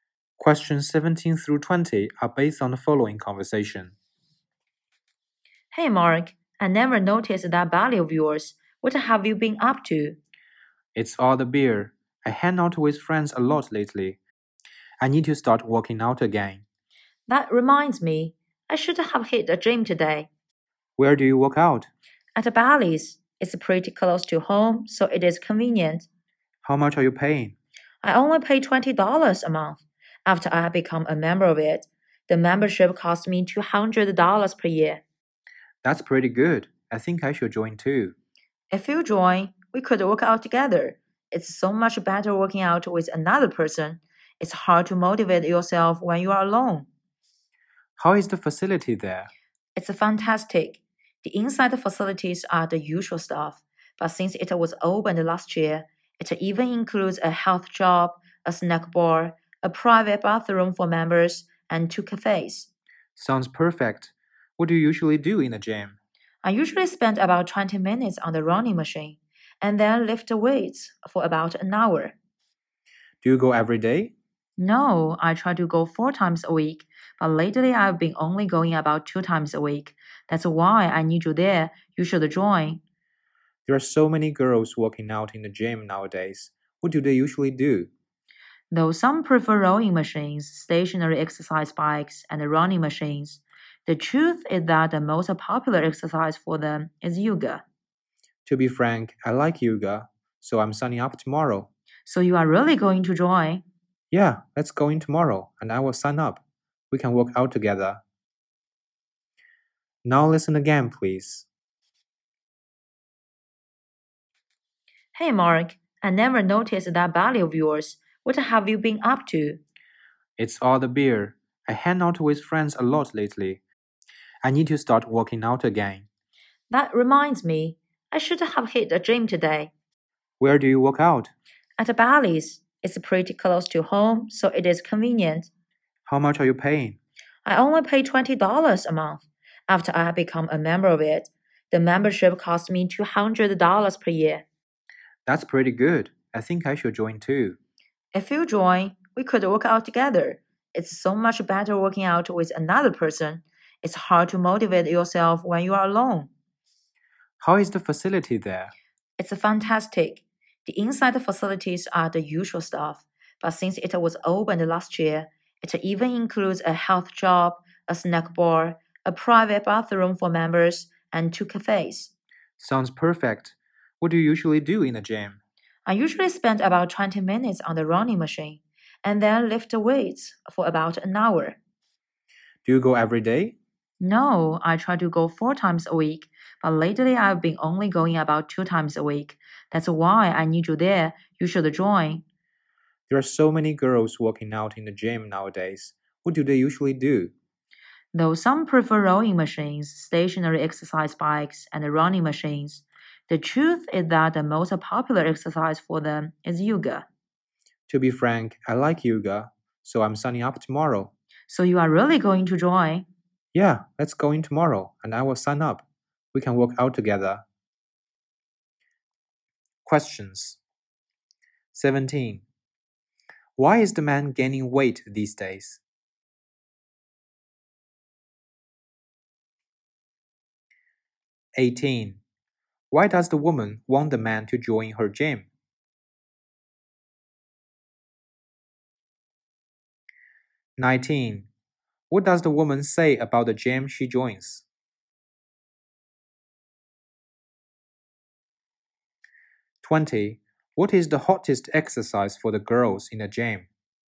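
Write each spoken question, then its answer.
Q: Why is the man gaining weight these days?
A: He drinks a lot of beer with friends

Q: Why does the woman want the man to join her gym?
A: Working out together keeps her motivated

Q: What is the hottest exercise for the girls in the gym?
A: Yoga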